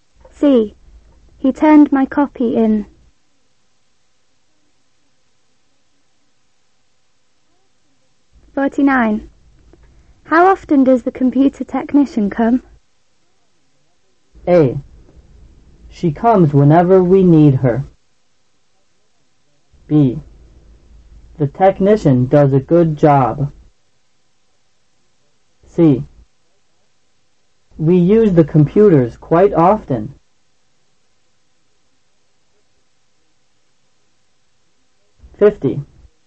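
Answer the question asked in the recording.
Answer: A: She comes whenever we need her.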